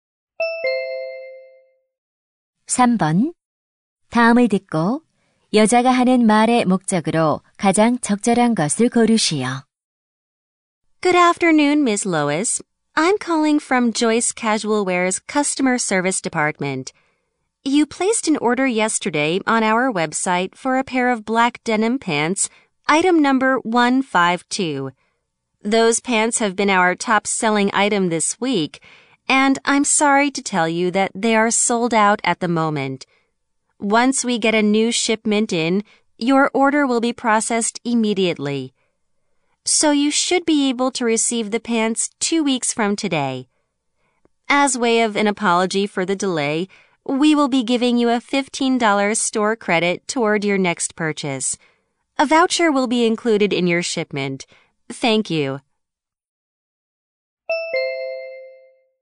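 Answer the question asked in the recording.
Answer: 주문한 바지가 품절되어 배송이 늦어짐을 알리려고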